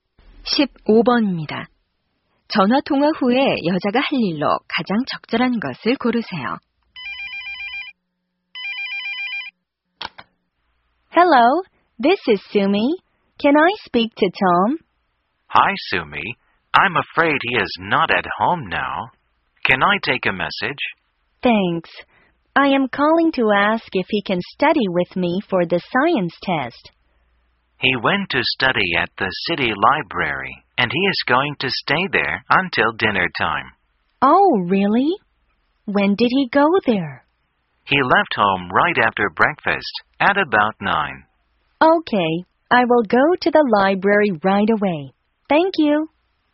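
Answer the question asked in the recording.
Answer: 도서관에 가기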